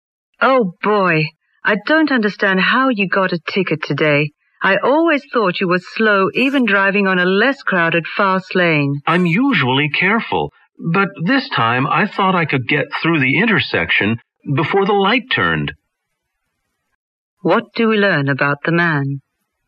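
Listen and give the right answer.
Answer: He tried to get through the intersection before the light changed and got a ticket.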